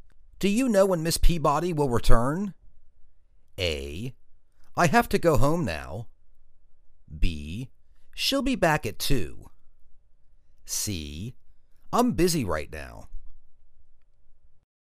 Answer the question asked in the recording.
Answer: She'll be back at 2.